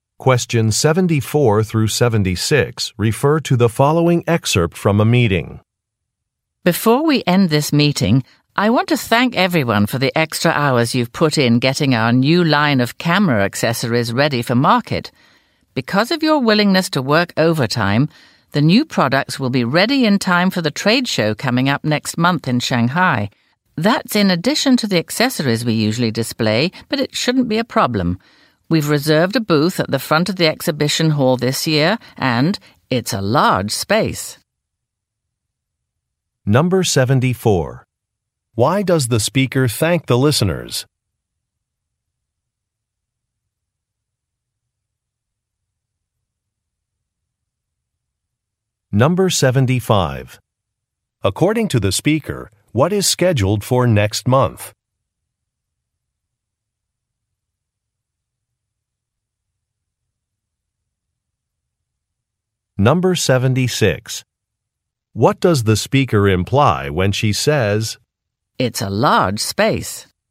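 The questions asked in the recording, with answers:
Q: Why does the speaker thank the listeners?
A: For working extra hours (overtime) to get the new camera accessories ready

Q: According to the speaker, what is scheduled for next month?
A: A trade show in Shanghai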